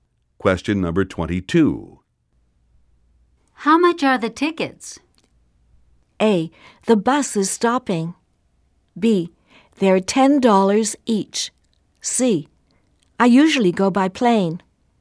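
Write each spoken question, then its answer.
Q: How much are the tickets?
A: B: They're $10 each.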